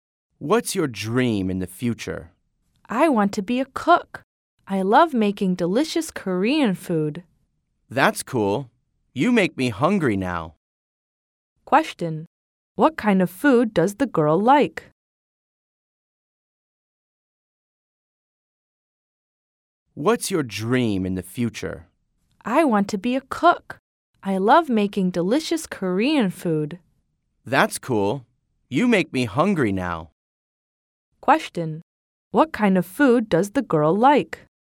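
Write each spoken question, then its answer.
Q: What kind of food does the girl like?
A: Korean food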